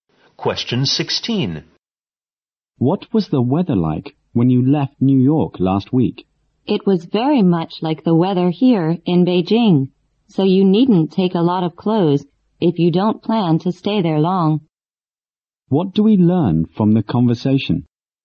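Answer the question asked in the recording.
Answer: The weather in New York is similar to Beijing's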